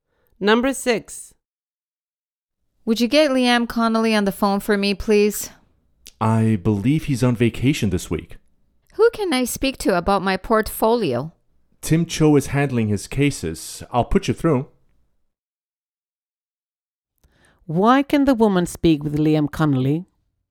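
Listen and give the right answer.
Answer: She can't, because he's on vacation this week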